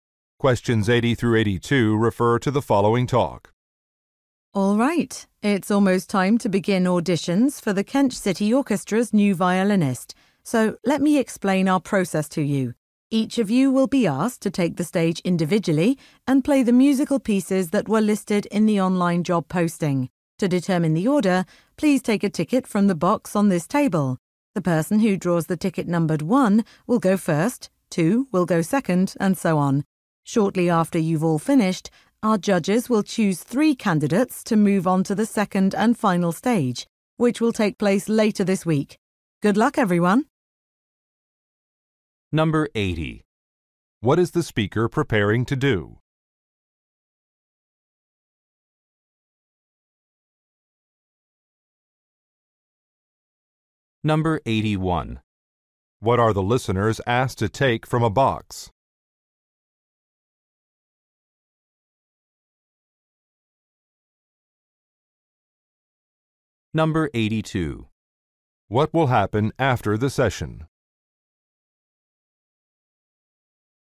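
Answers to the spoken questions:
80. Hold auditions for an orchestra violinist
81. A numbered ticket
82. Judges will choose three candidates for a final stage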